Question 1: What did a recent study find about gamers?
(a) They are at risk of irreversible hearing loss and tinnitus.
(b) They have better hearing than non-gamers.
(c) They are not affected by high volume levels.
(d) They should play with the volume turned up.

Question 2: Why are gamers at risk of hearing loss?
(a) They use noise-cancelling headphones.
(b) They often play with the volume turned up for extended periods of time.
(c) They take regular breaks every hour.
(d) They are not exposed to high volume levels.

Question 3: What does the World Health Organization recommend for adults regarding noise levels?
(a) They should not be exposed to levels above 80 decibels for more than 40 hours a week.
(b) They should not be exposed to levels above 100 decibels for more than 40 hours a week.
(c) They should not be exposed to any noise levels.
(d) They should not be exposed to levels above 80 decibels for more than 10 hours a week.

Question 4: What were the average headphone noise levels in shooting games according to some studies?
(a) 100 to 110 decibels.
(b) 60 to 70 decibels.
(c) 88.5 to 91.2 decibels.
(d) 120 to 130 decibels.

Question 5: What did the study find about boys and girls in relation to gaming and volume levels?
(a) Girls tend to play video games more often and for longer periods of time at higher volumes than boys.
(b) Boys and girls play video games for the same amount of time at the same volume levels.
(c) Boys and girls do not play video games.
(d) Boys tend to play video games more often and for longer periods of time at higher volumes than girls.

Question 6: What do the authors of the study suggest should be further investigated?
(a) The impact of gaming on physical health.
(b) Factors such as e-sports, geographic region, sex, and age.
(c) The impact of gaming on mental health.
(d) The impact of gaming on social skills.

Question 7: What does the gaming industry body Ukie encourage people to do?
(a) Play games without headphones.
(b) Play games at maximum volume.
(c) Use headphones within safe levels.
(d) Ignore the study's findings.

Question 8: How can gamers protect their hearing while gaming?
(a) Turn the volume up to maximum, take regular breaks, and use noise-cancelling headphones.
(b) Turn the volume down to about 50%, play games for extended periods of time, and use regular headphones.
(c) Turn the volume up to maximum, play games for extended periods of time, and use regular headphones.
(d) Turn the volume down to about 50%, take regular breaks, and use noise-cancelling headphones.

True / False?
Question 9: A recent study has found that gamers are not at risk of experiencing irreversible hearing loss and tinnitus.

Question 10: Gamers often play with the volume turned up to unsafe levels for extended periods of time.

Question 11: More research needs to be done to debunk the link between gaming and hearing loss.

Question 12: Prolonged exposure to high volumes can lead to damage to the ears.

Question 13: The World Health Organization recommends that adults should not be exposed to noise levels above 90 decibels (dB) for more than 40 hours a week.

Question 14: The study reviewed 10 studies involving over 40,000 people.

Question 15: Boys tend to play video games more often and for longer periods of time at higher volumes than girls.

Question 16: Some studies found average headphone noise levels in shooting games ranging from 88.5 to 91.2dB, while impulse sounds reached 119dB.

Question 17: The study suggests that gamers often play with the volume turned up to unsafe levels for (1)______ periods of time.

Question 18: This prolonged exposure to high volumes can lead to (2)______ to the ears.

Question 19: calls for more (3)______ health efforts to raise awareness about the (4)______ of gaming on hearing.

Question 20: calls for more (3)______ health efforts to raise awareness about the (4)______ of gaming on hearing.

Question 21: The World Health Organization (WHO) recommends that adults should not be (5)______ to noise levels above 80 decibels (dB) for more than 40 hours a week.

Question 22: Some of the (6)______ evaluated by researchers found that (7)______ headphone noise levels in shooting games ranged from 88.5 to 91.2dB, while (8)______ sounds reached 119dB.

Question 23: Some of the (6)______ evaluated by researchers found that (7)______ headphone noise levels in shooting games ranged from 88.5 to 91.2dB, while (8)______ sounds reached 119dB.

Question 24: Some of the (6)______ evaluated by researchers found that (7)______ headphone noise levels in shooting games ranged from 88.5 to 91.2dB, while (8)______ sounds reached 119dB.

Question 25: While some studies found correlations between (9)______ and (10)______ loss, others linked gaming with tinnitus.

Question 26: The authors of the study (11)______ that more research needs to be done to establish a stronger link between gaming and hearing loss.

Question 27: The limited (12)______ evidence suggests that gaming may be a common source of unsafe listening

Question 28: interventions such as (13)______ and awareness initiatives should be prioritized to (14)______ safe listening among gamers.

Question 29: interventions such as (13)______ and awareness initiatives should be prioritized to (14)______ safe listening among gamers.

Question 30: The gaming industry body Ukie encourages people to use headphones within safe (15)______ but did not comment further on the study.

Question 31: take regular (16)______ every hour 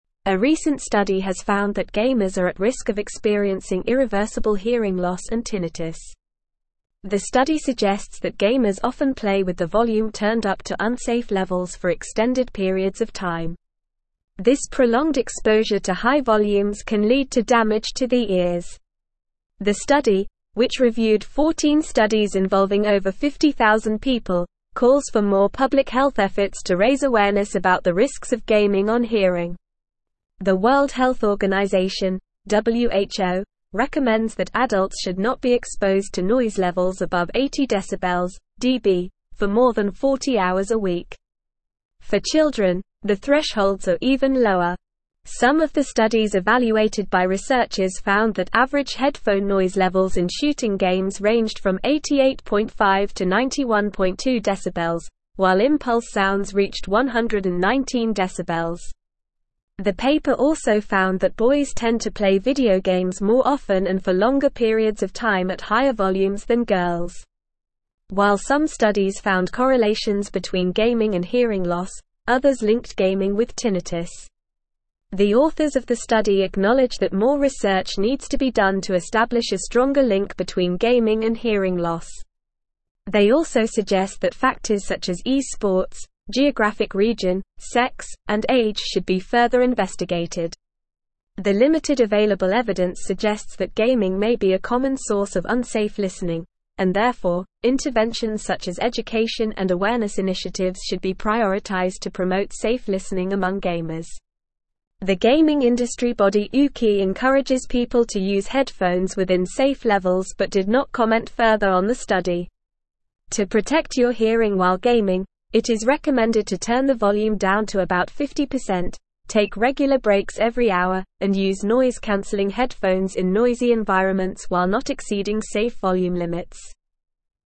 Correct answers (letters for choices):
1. a
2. b
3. a
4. c
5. d
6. b
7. c
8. d
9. False
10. True
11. False
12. True
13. False
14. False
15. True
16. True
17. extended
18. damage
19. public
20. risks
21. exposed
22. studies
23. average
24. impulse
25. hearing
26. acknowledge
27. available
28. education
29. promote
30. levels
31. breaks

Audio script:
A recent study has found that gamers are at risk of experiencing irreversible hearing loss and tinnitus. The study suggests that gamers often play with the volume turned up to unsafe levels for extended periods of time. This prolonged exposure to high volumes can lead to damage to the ears. The study, which reviewed 14 studies involving over 50,000 people, calls for more public health efforts to raise awareness about the risks of gaming on hearing. The World Health Organization (WHO) recommends that adults should not be exposed to noise levels above 80 decibels (dB) for more than 40 hours a week. For children, the thresholds are even lower. Some of the studies evaluated by researchers found that average headphone noise levels in shooting games ranged from 88.5 to 91.2dB, while impulse sounds reached 119dB. The paper also found that boys tend to play video games more often and for longer periods of time at higher volumes than girls. While some studies found correlations between gaming and hearing loss, others linked gaming with tinnitus. The authors of the study acknowledge that more research needs to be done to establish a stronger link between gaming and hearing loss. They also suggest that factors such as e-sports, geographic region, sex, and age should be further investigated. The limited available evidence suggests that gaming may be a common source of unsafe listening, and therefore, interventions such as education and awareness initiatives should be prioritized to promote safe listening among gamers. The gaming industry body Ukie encourages people to use headphones within safe levels but did not comment further on the study. To protect your hearing while gaming, it is recommended to turn the volume down to about 50%, take regular breaks every hour, and use noise-cancelling headphones in noisy environments while not exceeding safe volume limits.

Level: Level 4